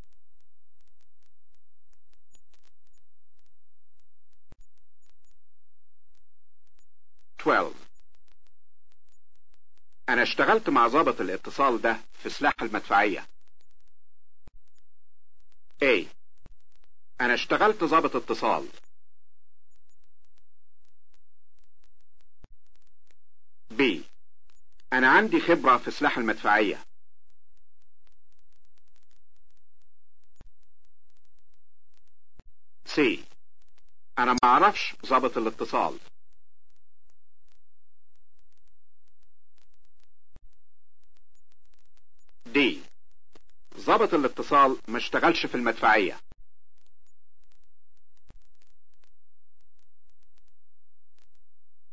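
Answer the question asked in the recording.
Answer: B: انا عندي خبرة في سلاح المدفعية.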